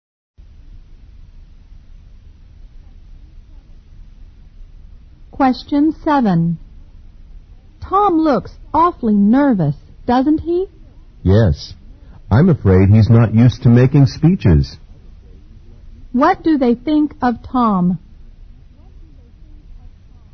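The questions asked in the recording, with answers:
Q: What do they think of Tom?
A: He's nervous because he isn't used to making speeches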